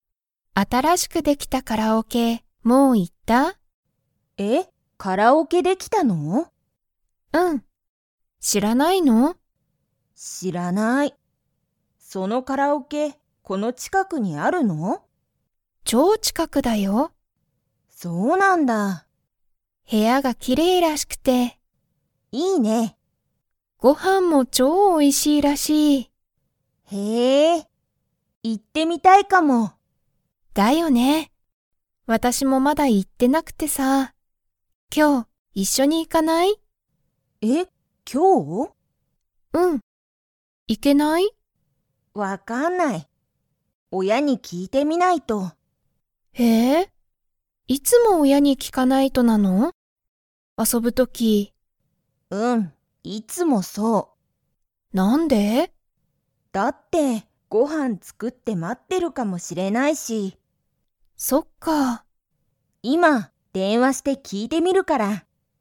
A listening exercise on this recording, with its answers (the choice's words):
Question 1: ユミは、新(あたら)しくできたカラオケにもう行(い)きましたか?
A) はい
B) いいえ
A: いいえ

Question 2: そのカラオケは、____ある。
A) 超近(ちょうちか)くに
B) 今(いま)すぐ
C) 部屋(へや)の前(まえ)に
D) きれいな所(ところ)に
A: 超近(ちょうちか)くに

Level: Level 2